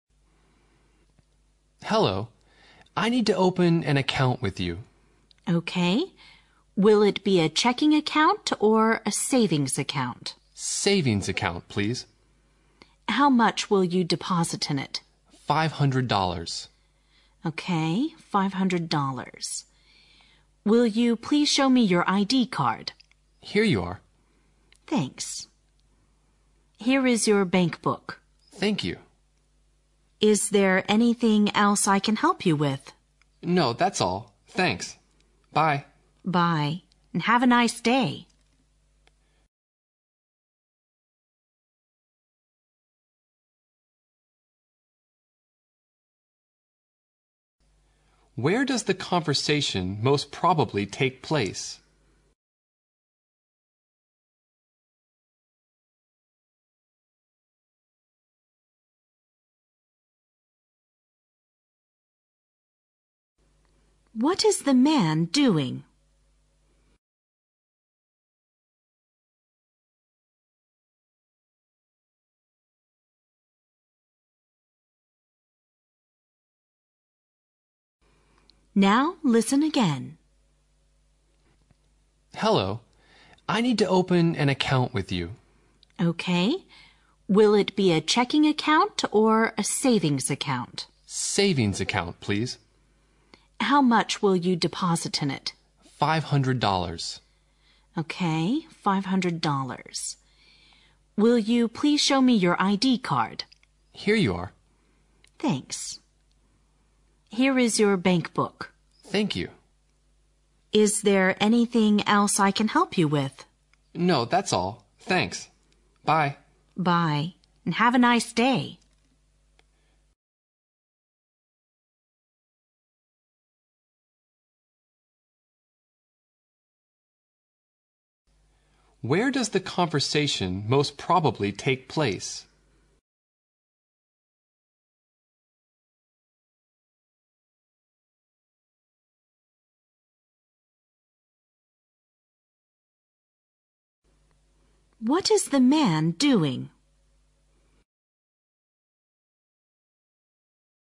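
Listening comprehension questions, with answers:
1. Where does the conversation most probably take place?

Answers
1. In a bank.

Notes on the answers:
推理判断题。问题询问"这个对话最可能发 生在什么地方"。对话中反复提及了account(账 户),checking account(支票账户),savings account (储蓄账户),bankbook(银行簿)等,还提到了de-posit(存钱),这些词都表明这个对话最可能发生在 "银行"里,因此本题选D。 [避错指南] 选项A(在一个商店里),选项B(在一家公 司里)和选项C(在一家旅行社里)与account等词的关 系均不如选项D(银行)直接、密切。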